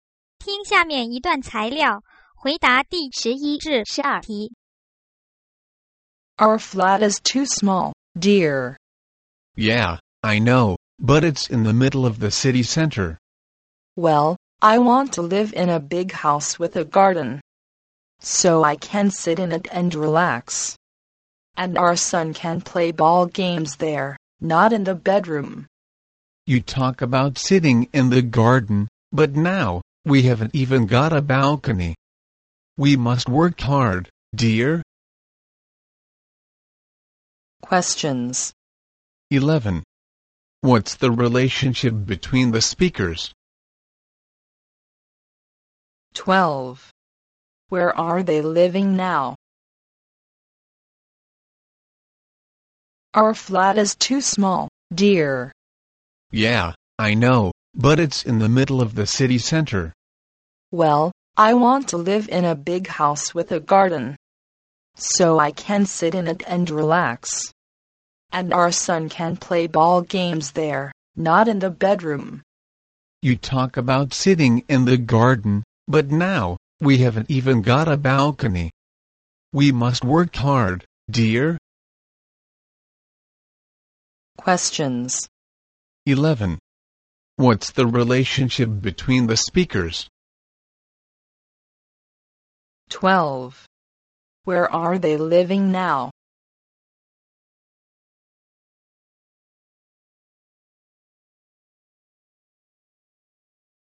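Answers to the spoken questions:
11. Husband and wife
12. In a small flat in the city center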